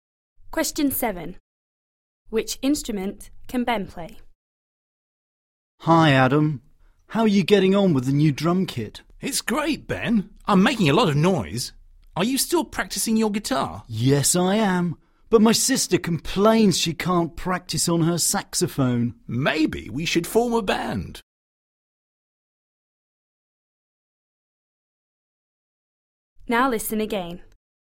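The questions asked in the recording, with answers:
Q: Which instrument can Ben play?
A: The guitar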